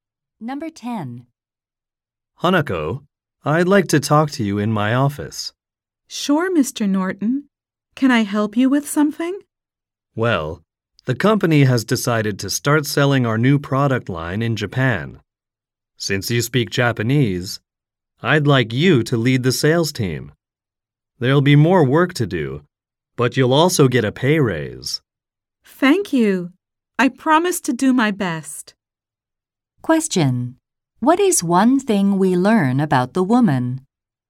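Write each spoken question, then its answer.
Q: What is one thing we learn about the woman?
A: She speaks Japanese and will lead the sales team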